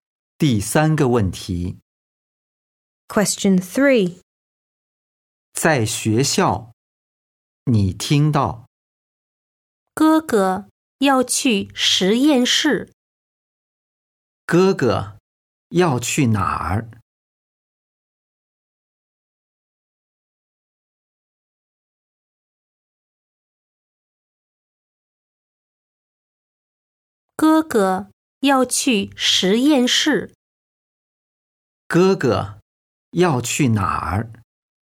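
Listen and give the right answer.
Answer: 实验室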